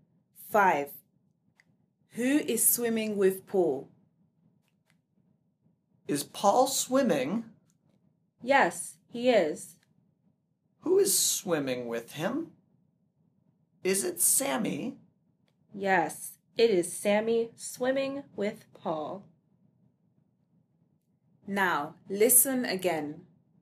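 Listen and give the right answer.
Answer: Sammy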